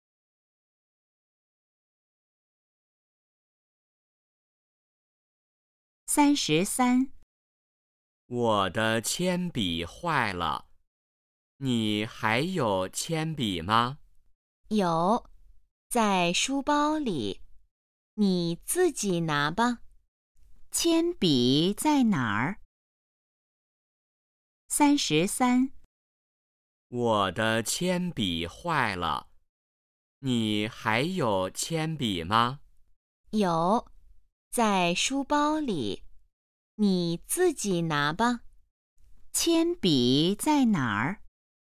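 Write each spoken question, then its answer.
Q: 铅笔在哪儿?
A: 在书包里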